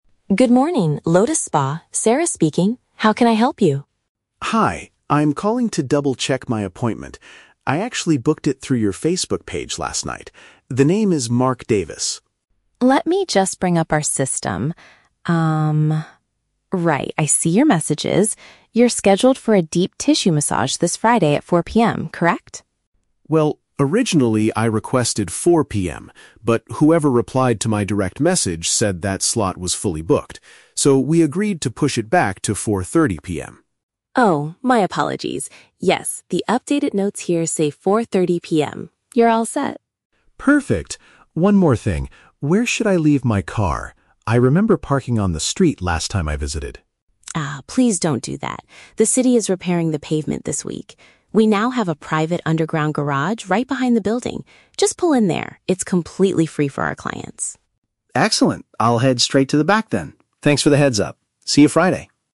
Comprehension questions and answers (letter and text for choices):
Listen to a phone conversation between a customer and a spa receptionist. For each question, choose the correct answer (A, B, or C).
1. Why is Mark calling the spa?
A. To cancel his Friday massage reservation.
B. To verify the details of an online booking.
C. To complain about a delayed response to his message.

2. What time is Mark's actual appointment?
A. 4:00 PM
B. 4:30 PM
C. 5:00 PM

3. Where does the receptionist advise Mark to park his vehicle?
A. Along the street in front of the spa.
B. In a public parking lot down the road.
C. In a designated area beneath the facility.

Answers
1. B. To verify the details of an online booking.
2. B. 4:30 PM
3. C. In a designated area beneath the facility.

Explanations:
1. Mark says he is calling to "double-check my appointment" which he booked "through your Facebook page" (online booking). Option (A) is a trap; he mentions Friday, but he wants to confirm the appointment, not cancel it. Option (C) is not mentioned.
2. Mark explains that they agreed to "push it back to 4:30 PM" because the earlier time was full, and the receptionist confirms this updated time. Option (A) is a trap; 4:00 PM was his original request and the time the receptionist mistakenly read first, but it was fully booked. Option (C) is never mentioned.
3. The receptionist tells him to use the "underground garage" (which means an area beneath the facility). Option (A) is a trap; Mark says he parked on the street "last time," but the receptionist tells him "please don't do that" because of pavement repairs. Option (B) is not mentioned.

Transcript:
Receptionist: Good morning, Lotus Spa, Sarah speaking. How can I help you?
Customer: Hi, I'm calling to double-check my appointment. I actually booked it through your Facebook page last night. The name is Mark Davis.
Receptionist: Let me just bring up our system. right, I see your messages. You're scheduled for a deep tissue massage this Friday at 4:00 PM, correct?
Customer: Well, originally I requested 4:00 PM, but whoever replied to my direct message said that slot was fully booked. So, we agreed to push it back to 4:30 PM.
Receptionist: Oh, my apologies! Yes, the updated notes here say 4:30 PM. You're all set.
Customer: Perfect. One more thing, where should I leave my car? I remember parking on the street last time I visited.
Receptionist: Ah, please don't do that. The city is repairing the pavement this week. We now have a private underground garage right behind the building. Just pull in there, it's completely free for our clients.